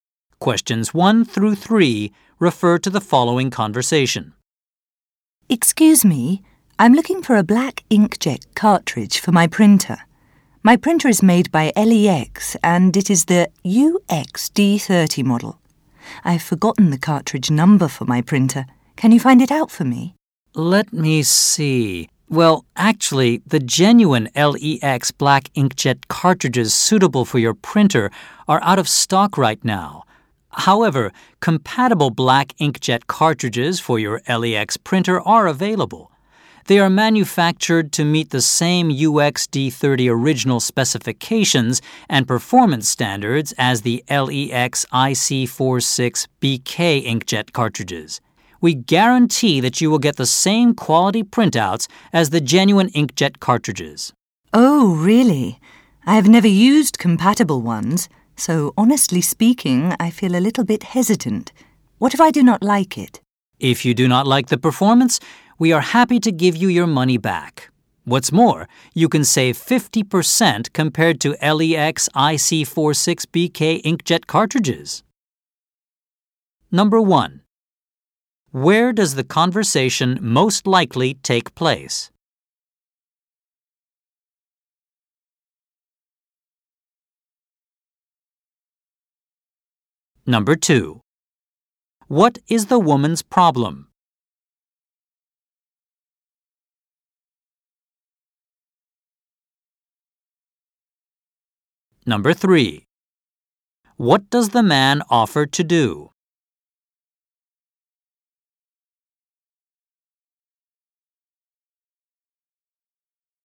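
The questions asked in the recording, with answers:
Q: Where does the conversation most likely take place?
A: At an office supply or electronics store

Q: What does the man offer to do?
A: Give her money back if she is not happy with the compatible cartridge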